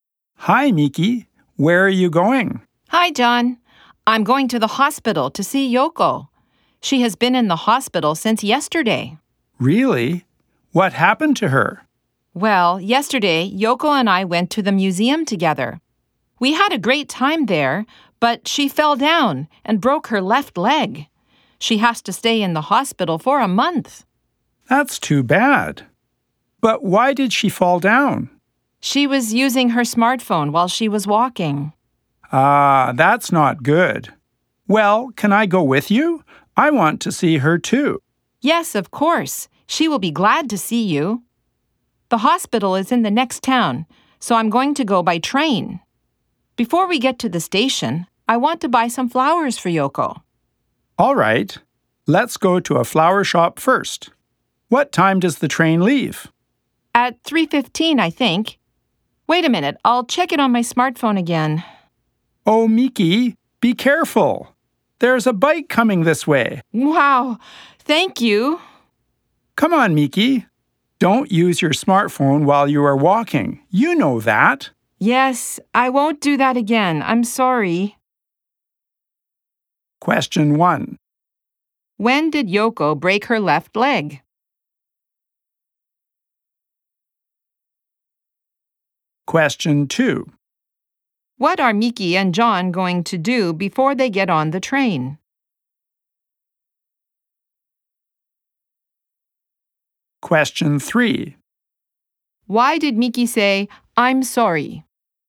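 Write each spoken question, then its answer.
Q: When did Yoko break her left leg?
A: Yesterday, at the museum.

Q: What are Miki and John going to do before they get on the train?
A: Buy some flowers for Yoko at a flower shop.

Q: Why did Miki say, I'm sorry?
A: Because she used her smartphone while walking.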